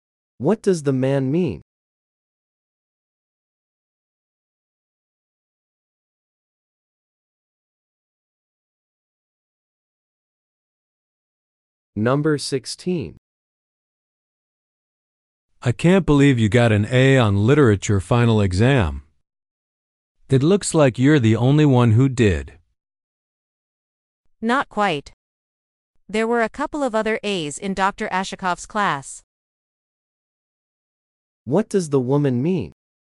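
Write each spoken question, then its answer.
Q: What does the woman mean?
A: A few other students also got A's.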